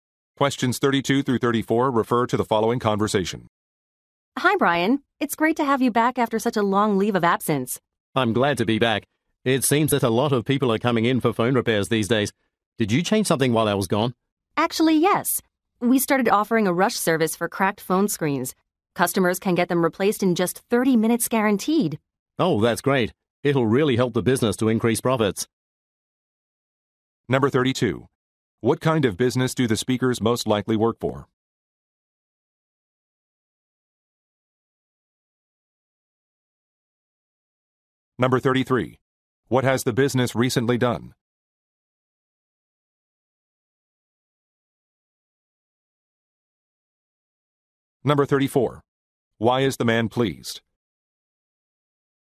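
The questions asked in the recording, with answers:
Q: What kind of business do the speakers most likely work for?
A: A phone repair shop

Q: What has the business recently done?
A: Started a rush service for replacing cracked phone screens

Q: Why is the man pleased?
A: The new service will help increase profits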